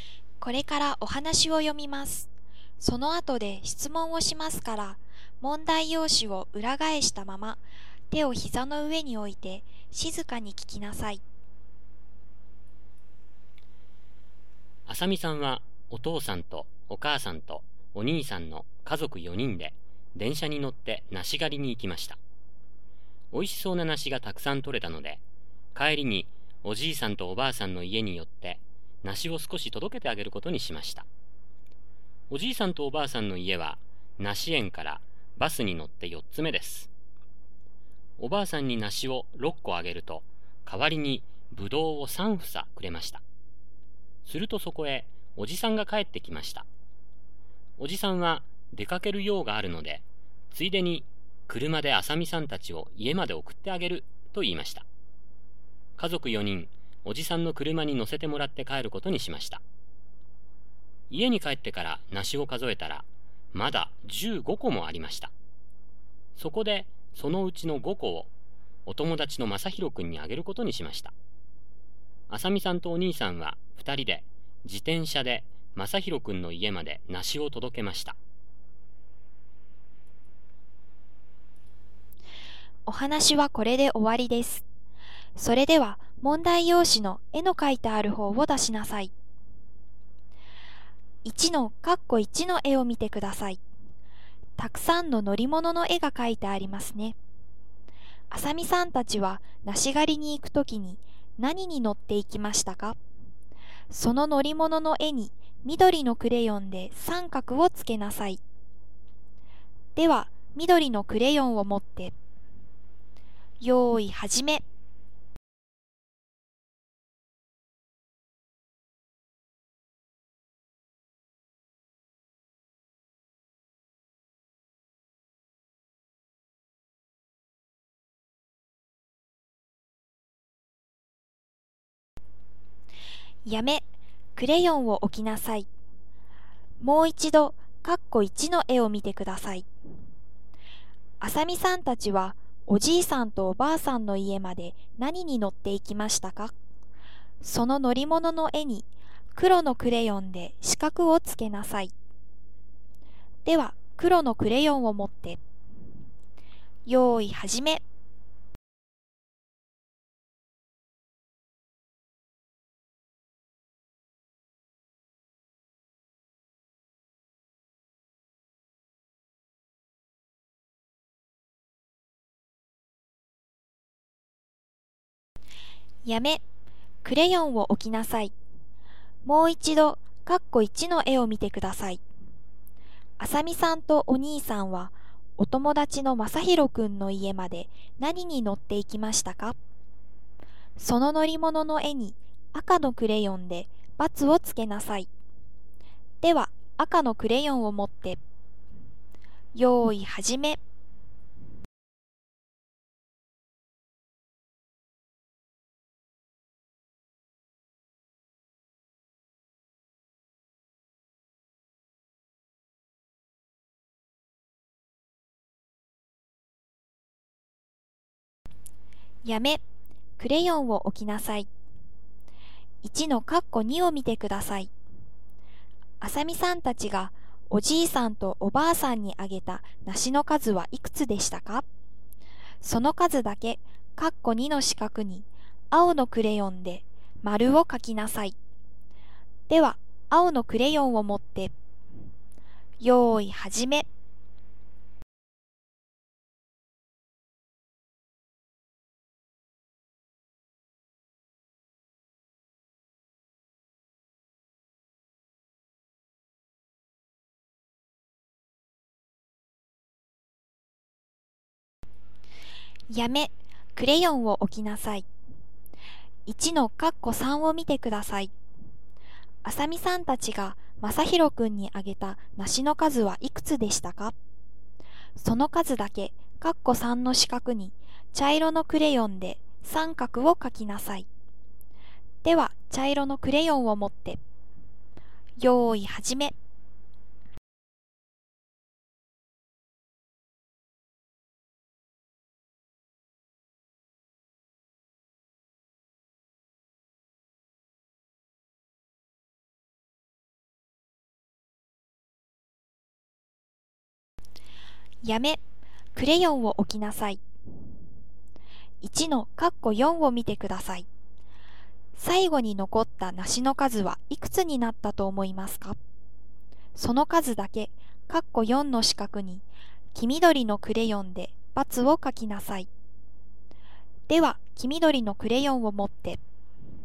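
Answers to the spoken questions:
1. 電車
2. バス
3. 自転車
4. 6個
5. 5個
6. 10個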